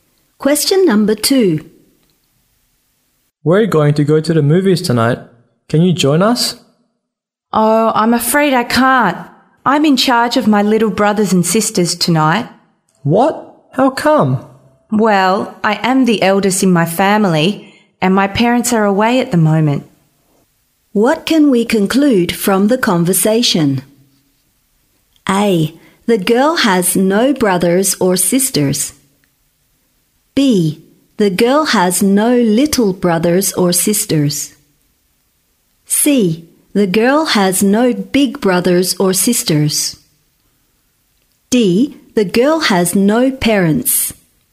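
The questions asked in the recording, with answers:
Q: What can we conclude from the conversation?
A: C: The girl has no big brothers or sisters.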